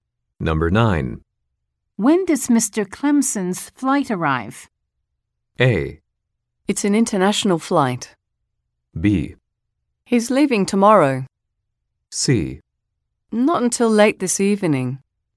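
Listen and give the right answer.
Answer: C: Not until late this evening.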